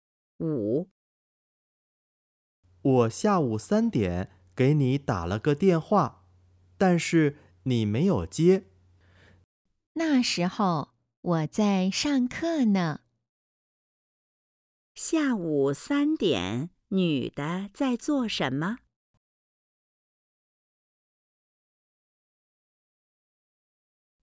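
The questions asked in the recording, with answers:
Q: 下午3点,女的在做什么?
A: 上课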